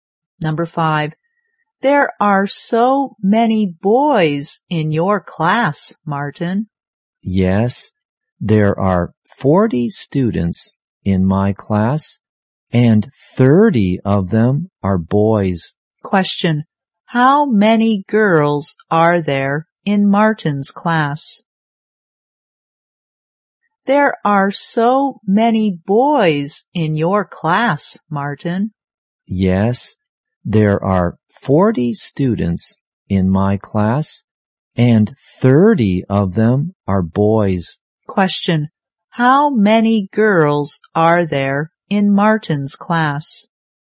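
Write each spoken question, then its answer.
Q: Question, how many girls are there in Martin's class?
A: 10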